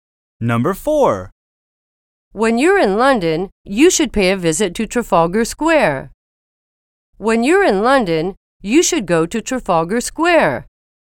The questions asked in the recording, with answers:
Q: When you're in London, you should go to Trafalgar Square.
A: Same is the correct answer.